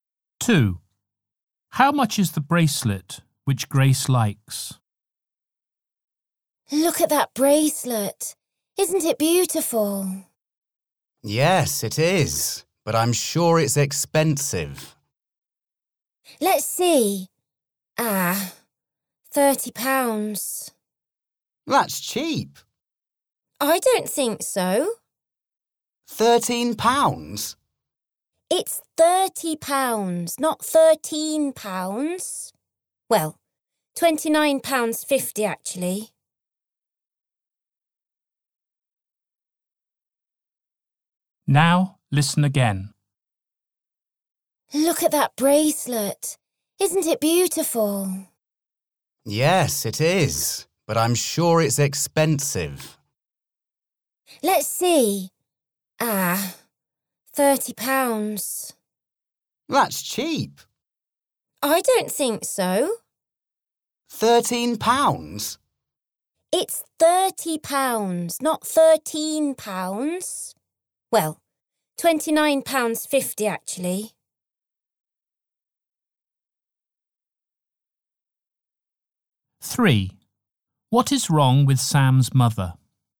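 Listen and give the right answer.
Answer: £29.50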